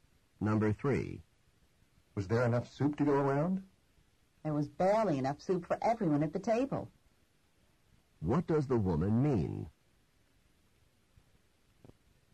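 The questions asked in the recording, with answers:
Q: What does the woman mean?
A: There was just enough soup for everyone.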